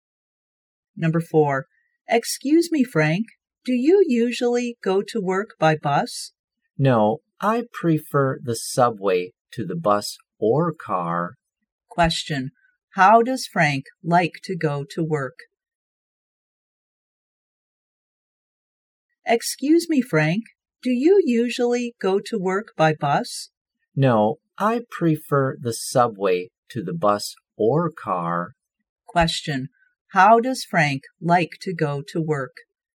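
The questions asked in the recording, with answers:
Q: how does Frank like to go to work?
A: By subway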